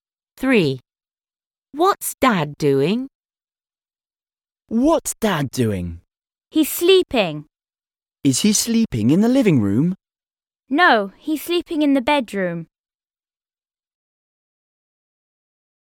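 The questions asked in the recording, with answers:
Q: What's Dad doing?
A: Sleeping (in the bedroom)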